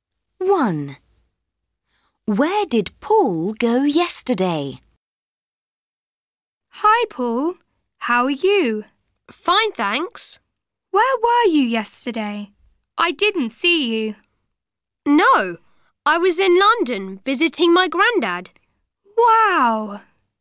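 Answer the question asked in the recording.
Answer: London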